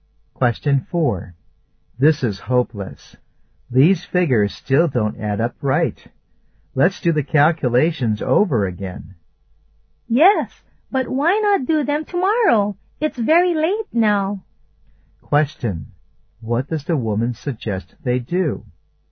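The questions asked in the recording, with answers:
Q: What does the woman suggest they do?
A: Do the calculations again tomorrow.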